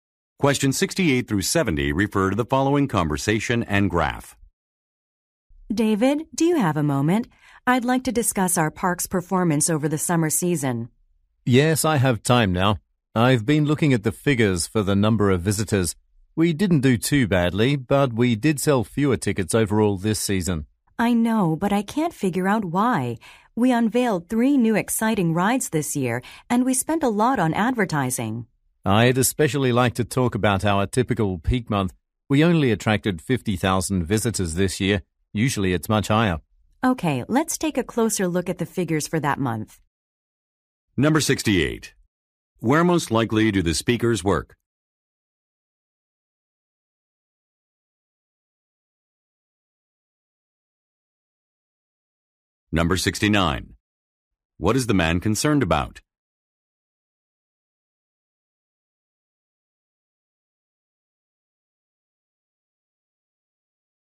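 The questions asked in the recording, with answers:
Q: Where most likely do the speakers work?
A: At an amusement park

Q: What is the man concerned about?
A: Fewer tickets were sold this season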